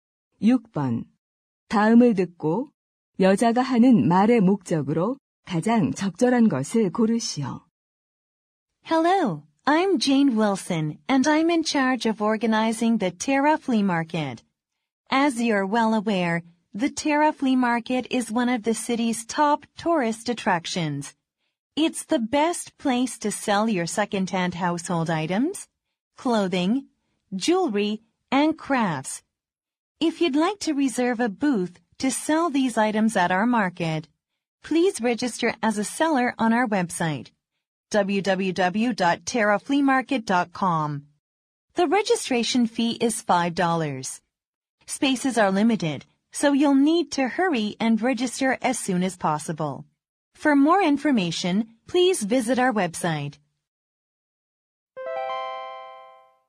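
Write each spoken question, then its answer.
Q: 다음을 듣고 여자가 하는 말의 목적으로 가장 적절한 것을 고르시오.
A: 벼룩시장 판매자 등록을 안내하려고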